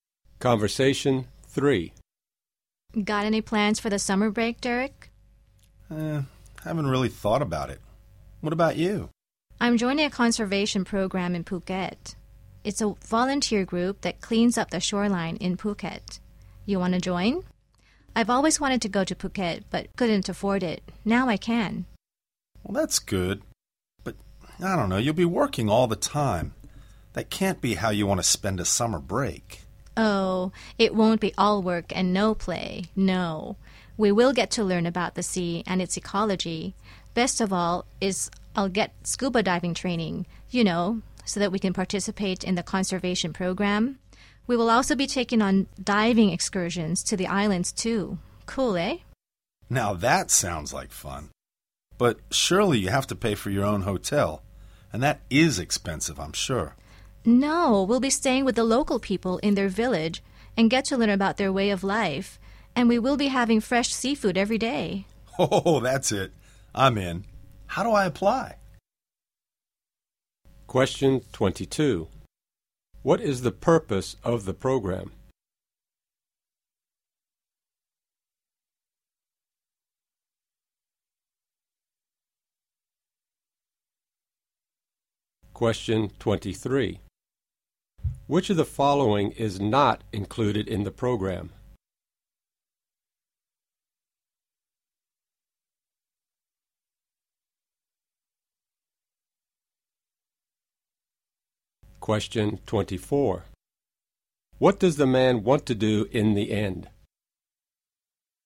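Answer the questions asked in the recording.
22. To clean up the shoreline in Phuket (conservation)
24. Join the program (apply)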